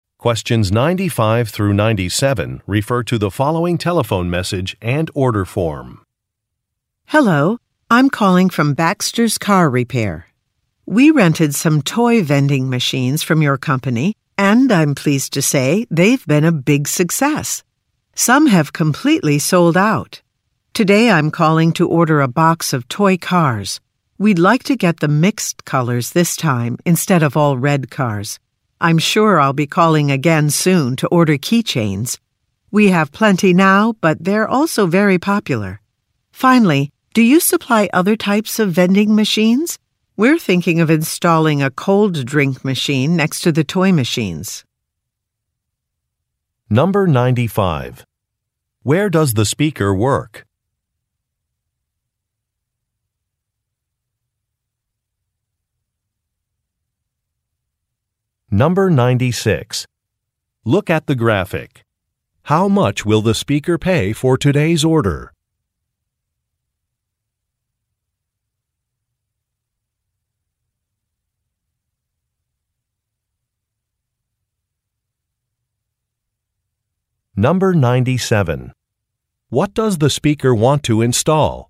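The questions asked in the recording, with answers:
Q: Where does the speaker work?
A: At a car repair shop (Baxter's Car Repair)

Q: What does the speaker want to install?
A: A cold drink machine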